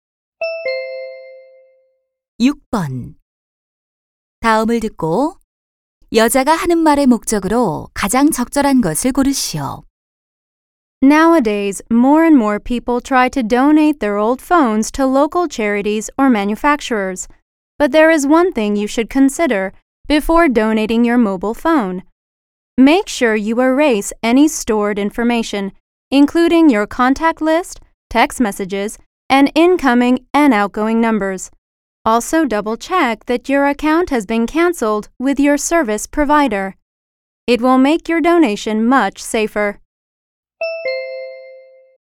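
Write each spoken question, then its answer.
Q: 다음을 듣고 여자가 하는 말의 목적으로 가장 적절한 것을 고르시오.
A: 휴대전화 기부 전 개인정보 삭제를 당부하려고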